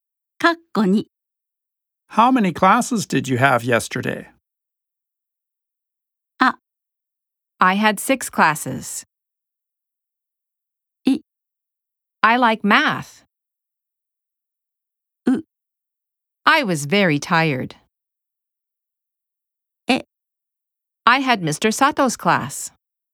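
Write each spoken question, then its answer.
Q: How many classes did you have yesterday?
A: A: I had 6 classes.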